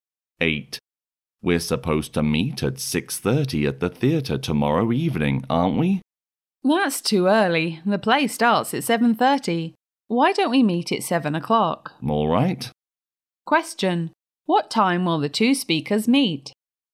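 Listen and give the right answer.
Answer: At 7 o'clock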